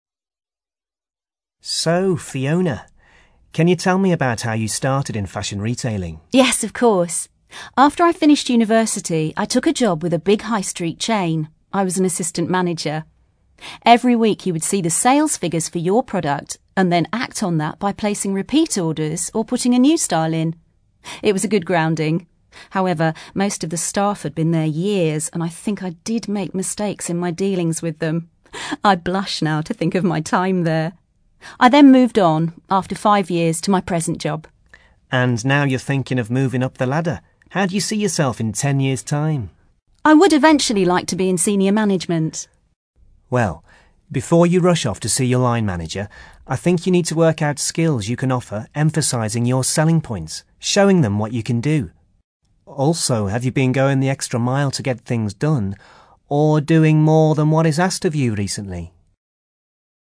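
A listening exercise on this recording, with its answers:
ACTIVITY 26: You are going to listen to part of an interview with a woman who works in retail management. Listen carefully and answer the questions below. Then check the audio transcription and the answers.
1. How does the woman feel now about her first job in retailing?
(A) Pleased by the way she handled the staff.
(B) Confident that it gave her a good start.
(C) Relaxed about the mistakes she made.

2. What is the woman advised to do next?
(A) Reflect on her skills.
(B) Volunteer for extra work.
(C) Discuss her situation with her boss.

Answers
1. (B) Confident that it gave her a good start.
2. (A) Reflect on her skills.

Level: CAE Certificate in Advanced English

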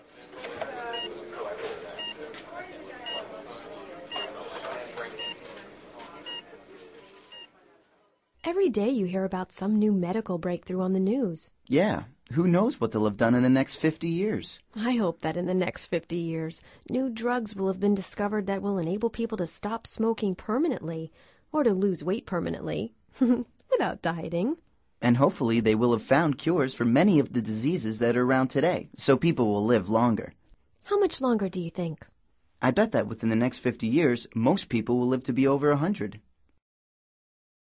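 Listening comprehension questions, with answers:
Activity 120: Basándote en los comentarios anteriores, selecciona las opciones más adecuadas. Verifica luego las respuestas correctas.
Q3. Dialogue # 2 suggests that ...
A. drugs will enable people to go on a diet.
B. drugs will enable people to stop smoking.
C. people will be able to keep on smoking.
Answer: B. drugs will enable people to stop smoking.

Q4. Dialogue # 2 also suggests that ...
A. a drug will enable people to live to be over 120.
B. cures for many diseases will have been found.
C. people will be able to live to be 90 or 100.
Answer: B. cures for many diseases will have been found.

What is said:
Every day you hear about some new medical breakthrough on the news.
Yeah. Who knows what they'll have done in the next 50 years?
I hope that in the next 50 years new drugs will have been discovered that will enable people to stop smoking permanently, or to lose weight permanently – without dieting!
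And hopefully they will have found cures for many of the diseases that are around today, so people will live longer.
How much longer do you think?
I bet that within the next 50 years, most people will live to be over 100.

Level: Nivel Avanzado

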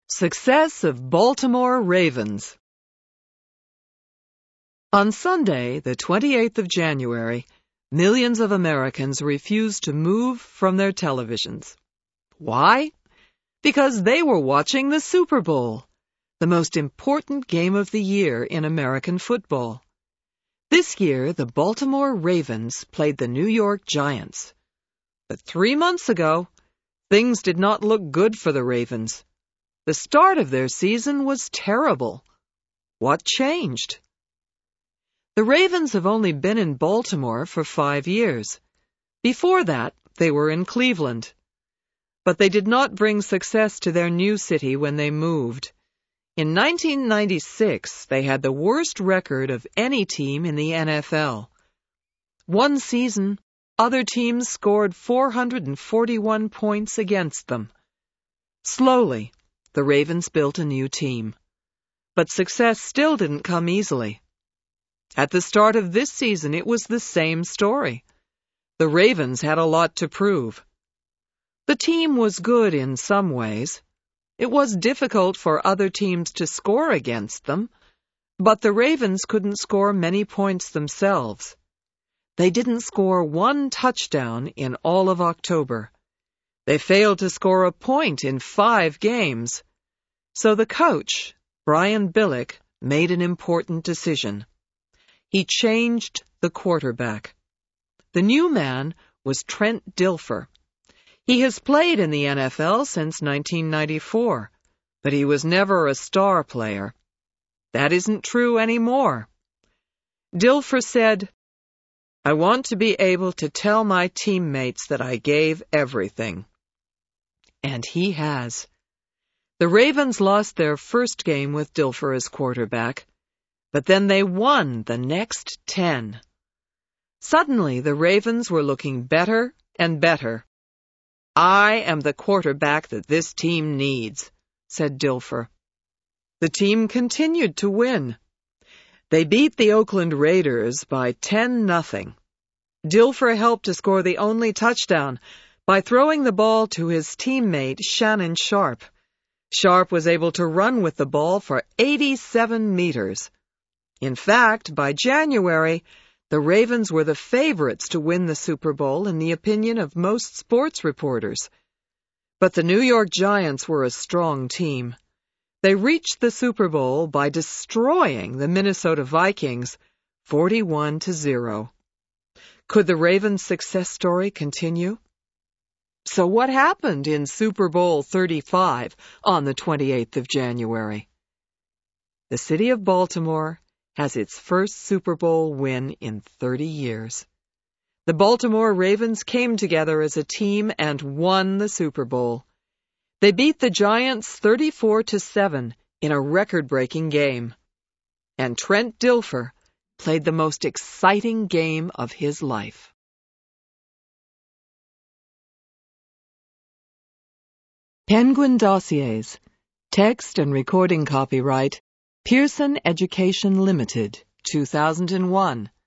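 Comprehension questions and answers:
Choose the correct answer.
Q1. The Ravens play in ...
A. New York.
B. Baltimore.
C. Cleveland.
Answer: B. Baltimore.

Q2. Trent Dilfer is ...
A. the quarterback for the Ravens..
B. the coach for the Ravens.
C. the quarterback for the Giants.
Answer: A. the quarterback for the Ravens..

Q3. The Ravens ...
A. played well all season.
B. lost every game this season.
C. didn't score a touchdown in October.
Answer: C. didn't score a touchdown in October.

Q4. With the new quarterback, the Ravens ...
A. won every game.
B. lost their first game.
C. beat the Minnesota Vikings.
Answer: B. lost their first game.

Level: HIGH INTERMEDIATE

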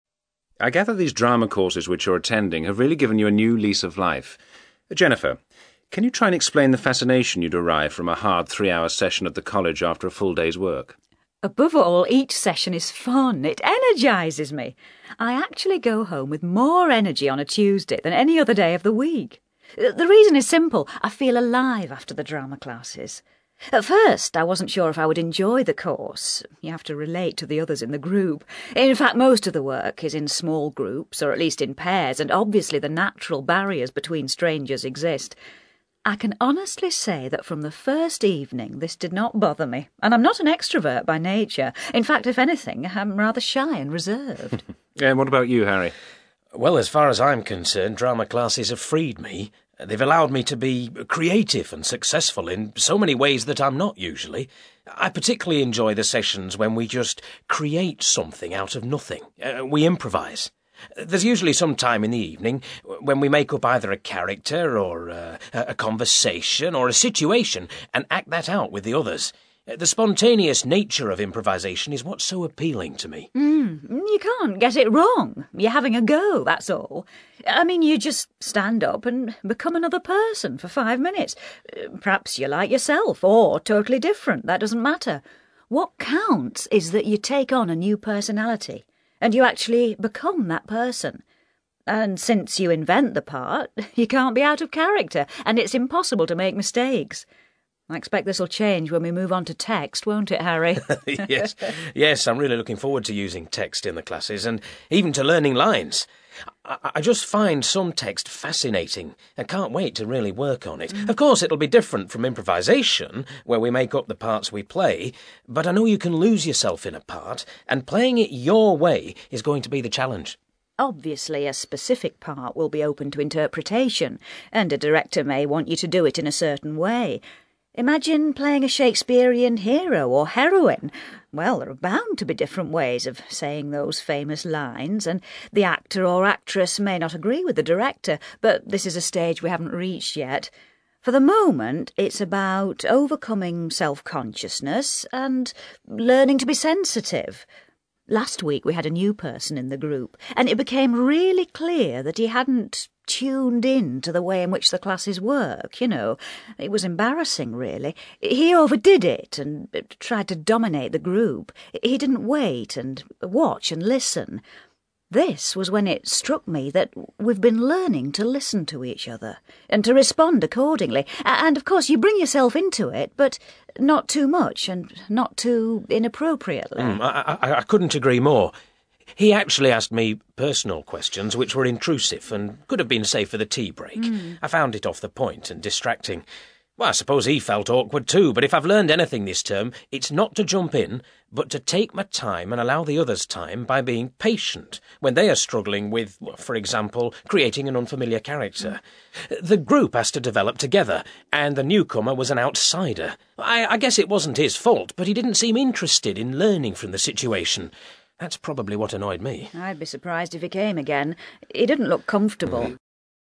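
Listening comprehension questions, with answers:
You will hear a radio interview in which Harry and Jennifer, two members of an after-work adult drama class, are asked about their reasons for attending the class. For questions 1-6, choose the answer (A, B, C or D) which fits best according to what you hear.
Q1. How does Jennifer feel about working with strangers in the class?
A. Resigned to the need for it.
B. Doubtful about the value of it.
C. Relaxed in her attitude towards it.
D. Excited at the thought of it.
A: C. Relaxed in her attitude towards it.

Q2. According to Harry, the improvisation sessions...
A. require some careful preparation.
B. enable him to use his imagination.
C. allow him to show his acting talent.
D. encourage him to relate to the group.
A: B. enable him to use his imagination.

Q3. What does Jennifer say about improvisation?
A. It is important not to make a mistake.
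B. It is necessary to be aware of the timing.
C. You should be familiar with the character you invent.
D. You need to be completely involved in the activity.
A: D. You need to be completely involved in the activity.

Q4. In Jennifer's opinion, playing written parts will...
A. be less challenging than improvisation.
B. include research into previous performances.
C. involve guidance from an expert.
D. lead to competition for parts.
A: C. involve guidance from an expert.

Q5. Jennifer says that the drama classes have taught her how to...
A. improve her interaction with people.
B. manage groups of people.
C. develop her natural acting skills.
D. be satisfied with minor achievements.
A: A. improve her interaction with people.

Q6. Harry was annoyed because the newcomer to the group...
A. interrupted the class by arriving late.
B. was reluctant to participate.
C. seemed unaware of the mood of the group.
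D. wasted the tea break with pointless questions.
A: C. seemed unaware of the mood of the group.

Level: CAE Certificate in Advanced English

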